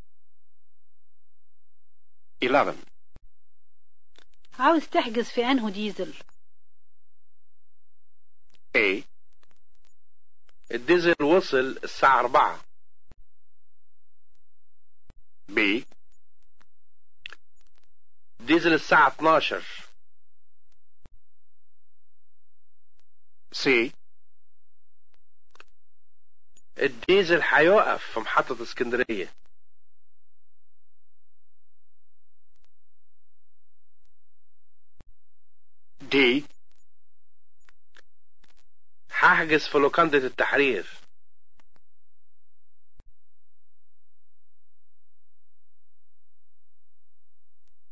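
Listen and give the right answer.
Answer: B: ديزل الساعة 12.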